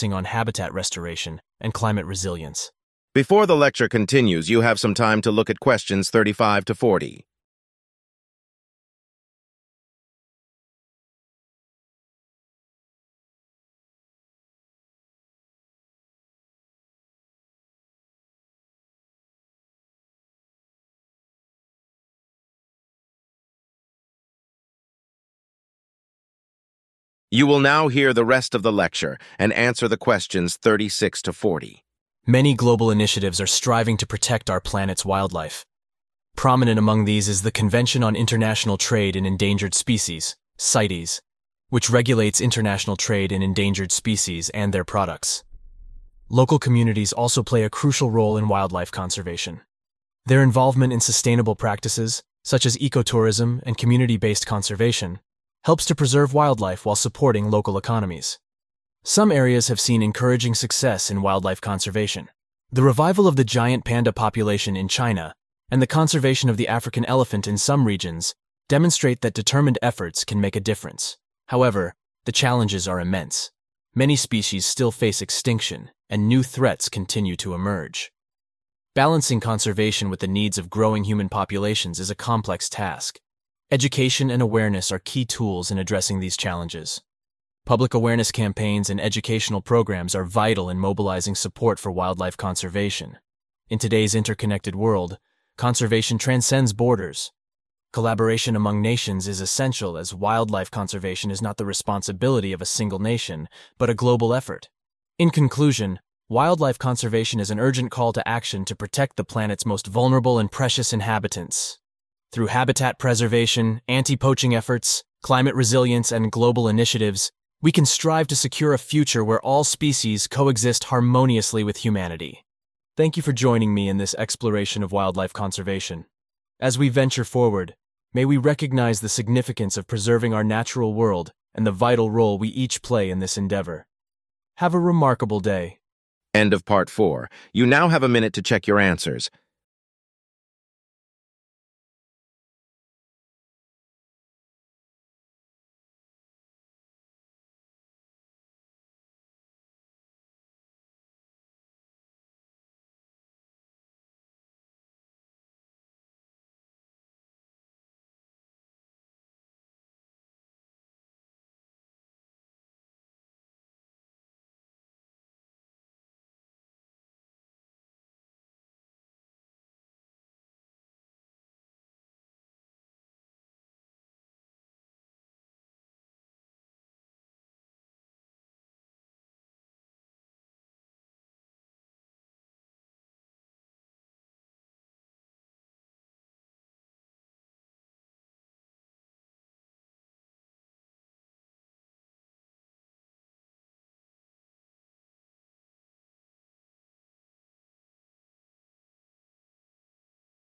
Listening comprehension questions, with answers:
Answer the questions and write no more than three words and/or a number.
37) What is an example of a successful conservation effort in China?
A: giant panda

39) What is the importance of education and awareness?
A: mobilizing support

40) What is the nature of wildlife conservation in today's world?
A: global effort

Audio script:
Anti-poaching efforts are another vital component. These initiatives aim to combat the illegal trade in wildlife, such as ivory and rhino horn, by enhancing law enforcement and increasing awareness about the consequences of poaching.
Climate change poses a grave threat to wildlife. It alters ecosystems and disrupts migratory patterns. Conservation efforts are adapting to address these shifts, focusing on habitat restoration and climate resilience.
Many global initiatives are striving to protect our planet's wildlife. Prominent among these is the Convention on International Trade in Endangered Species (CITES), which regulates international trade in endangered species and their products.
Local communities also play a crucial role in wildlife conservation. Their involvement in sustainable practices, such as ecotourism and community-based conservation, helps to preserve wildlife while supporting local economies.
Some areas have seen encouraging success in wildlife conservation. The revival of the giant panda population in China and the conservation of the African elephant in some regions demonstrate that determined efforts can make a difference.
However, the challenges are immense. Many species still face extinction, and new threats continue to emerge. Balancing conservation with the needs of growing human populations is a complex task.
Education and awareness are key tools in addressing these challenges. Public awareness campaigns and educational programs are vital in mobilizing support for wildlife conservation.
In today's interconnected world, conservation transcends borders. Collaboration among nations is essential, as wildlife conservation is not the responsibility of a single nation but a global effort.
In conclusion, wildlife conservation is an urgent call to action to protect the planet's most vulnerable and precious inhabitants. Through habitat preservation, anti-poaching efforts, climate resilience, and global initiatives, we can strive to secure a future where all species coexist harmoniously with humanity.
Thank you for joining me in this exploration of wildlife conservation. As we venture forward, may we recognize the significance of preserving our natural world and the vital role we each play in this endeavor. Have a remarkable day!
35. international trade